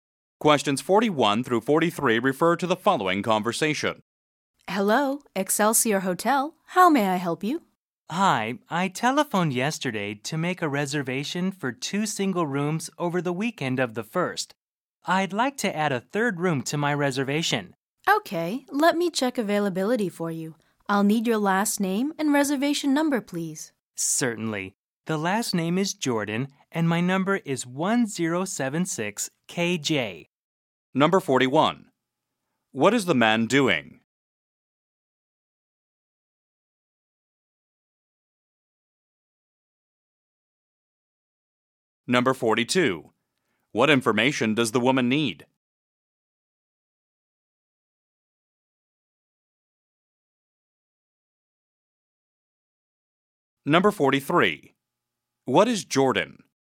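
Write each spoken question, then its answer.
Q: What is the man doing?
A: Adding a third room to a hotel reservation

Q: What information does the woman need?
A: His last name and reservation number

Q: What is Jordan?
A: The caller's last name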